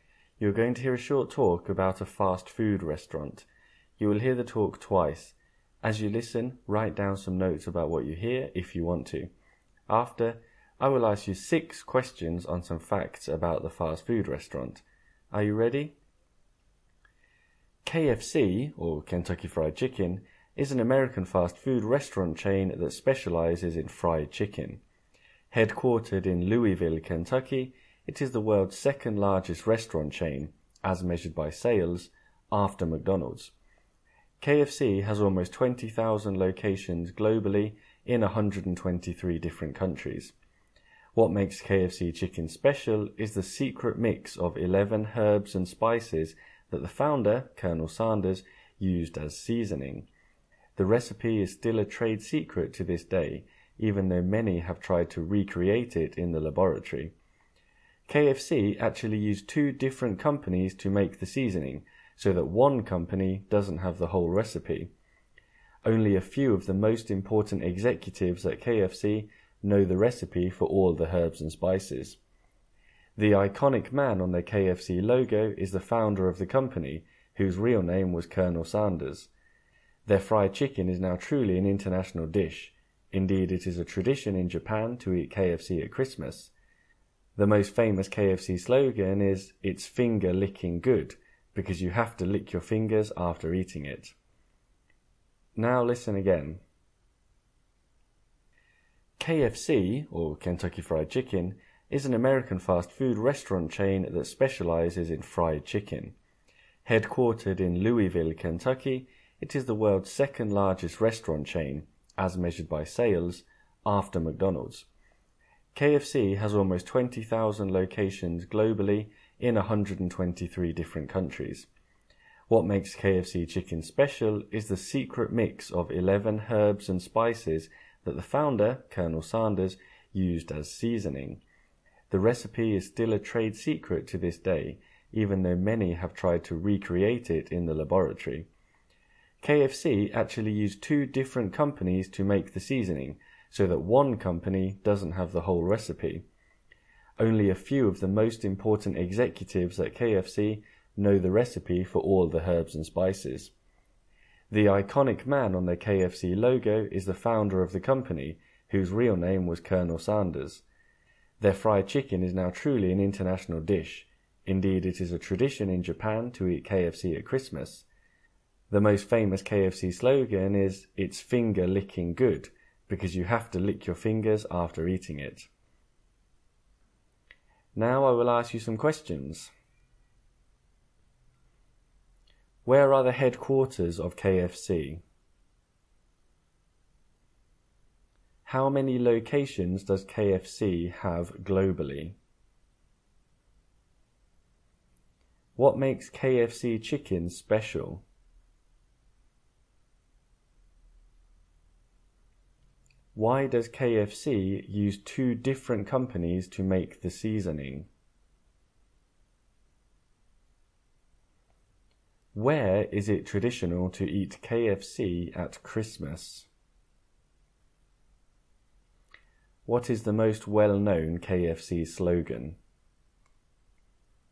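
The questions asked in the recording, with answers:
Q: Where are the headquarters of KFC?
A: Louisville, Kentucky

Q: How many locations does KFC have globally?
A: Almost 20,000

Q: What makes KFC chicken special?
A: The secret mix of 11 herbs and spices

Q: Why does KFC use 2 different companies to make the seasoning?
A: So that one company doesn't have the whole recipe

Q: Where is it traditional to eat KFC at Christmas?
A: Japan

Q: What is the most well-known KFC slogan?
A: It's finger licking good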